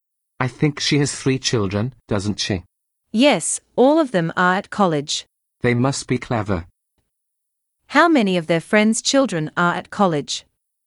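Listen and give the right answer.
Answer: Three (all of them).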